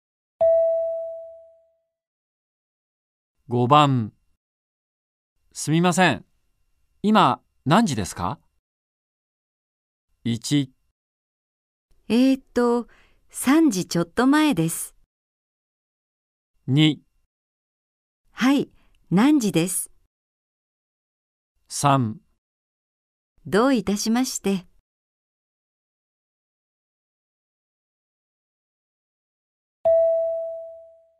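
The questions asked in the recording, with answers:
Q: すみません。今、何時ですか?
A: 1: 3時ちょっと前です。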